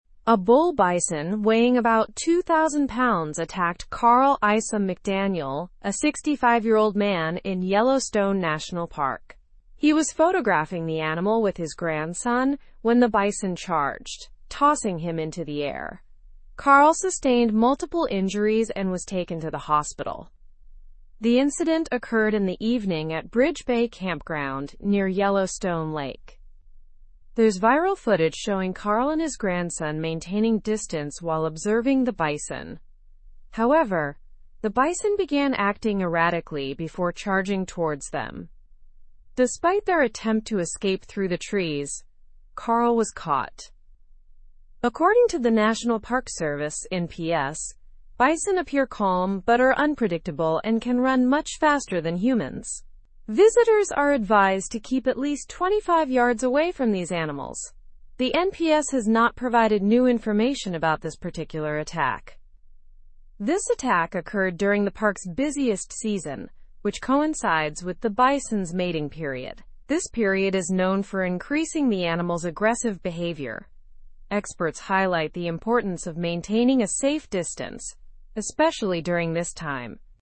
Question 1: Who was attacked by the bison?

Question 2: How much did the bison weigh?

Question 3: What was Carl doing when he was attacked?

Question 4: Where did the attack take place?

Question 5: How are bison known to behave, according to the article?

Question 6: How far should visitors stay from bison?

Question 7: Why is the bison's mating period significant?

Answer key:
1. Carl Isom-McDaniel was attacked by the bison.
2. The bison weighed about 2,000 pounds.
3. Carl was photographing the bison with his grandson.
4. The attack took place at Bridge Bay Campground.
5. Bison are known to be unpredictable and can run faster than humans.
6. Visitors should stay at least 25 yards away from bison.
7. The bison's mating period is significant because it increases their aggressive behavior.

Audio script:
A bull bison weighing about 2,000 pounds attacked Carl Isom-McDaniel, a 65-year-old man, in Yellowstone National Park. He was photographing the animal with his grandson when the bison charged, tossing him into the air. Carl sustained multiple injuries and was taken to the hospital.
The incident occurred in the evening at Bridge Bay Campground near Yellowstone Lake. There's viral footage showing Carl and his grandson maintaining distance while observing the bison. However, the bison began acting erratically before charging towards them. Despite their attempt to escape through the trees, Carl was caught.
According to the National Park Service (NPS), bison appear calm but are unpredictable and can run much faster than humans. Visitors are advised to keep at least 25 yards away from these animals. The NPS has not provided new information about this particular attack.
This attack occurred during the park's busiest season, which coincides with the bison's mating period. This period is known for increasing the animal's aggressive behavior. Experts highlight the importance of maintaining a safe distance, especially during this time.

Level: Level 3